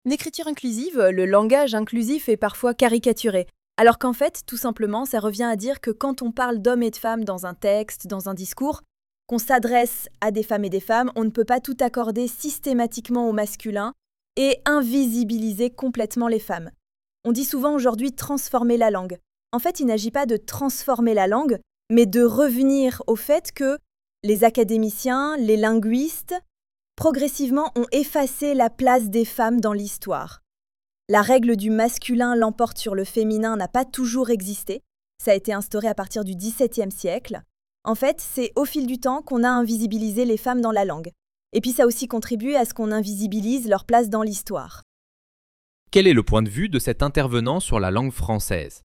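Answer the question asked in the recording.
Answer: Au fil du temps, la langue a invisibilisé les femmes ; la règle du masculin qui l'emporte n'a pas toujours existé.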